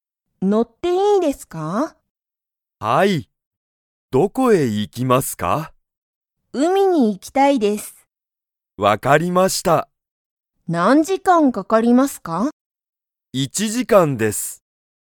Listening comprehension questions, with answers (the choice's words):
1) ナナコは、____に行(い)きたい。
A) 水(みず)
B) 家族(かぞく)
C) 時間(じかん)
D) 海(うみ)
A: 海(うみ)

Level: Level 1